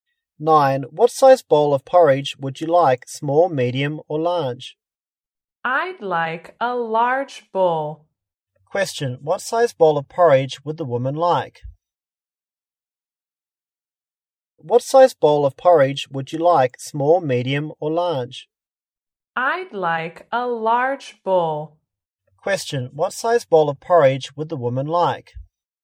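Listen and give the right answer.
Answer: A large bowl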